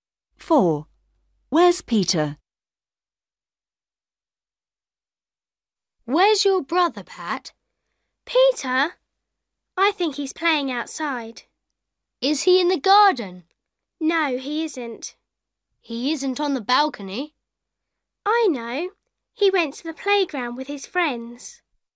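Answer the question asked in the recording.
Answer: At the playground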